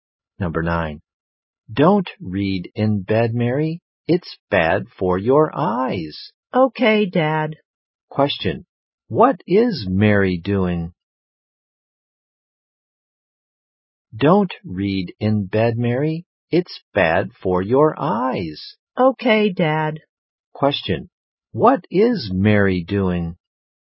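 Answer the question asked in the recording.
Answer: Reading in bed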